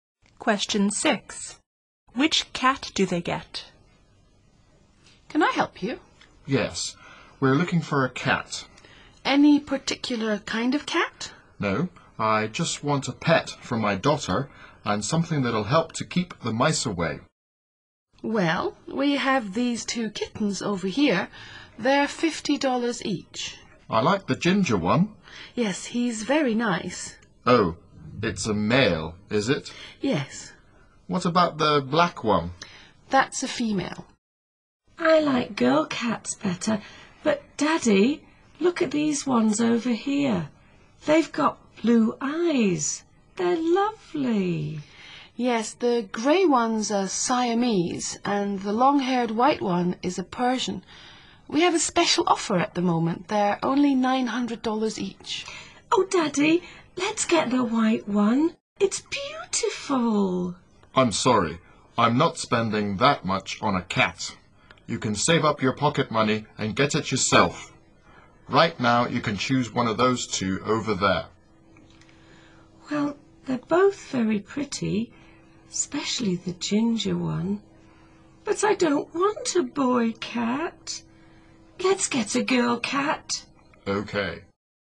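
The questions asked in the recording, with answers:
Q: Which cat do they get?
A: The black female kitten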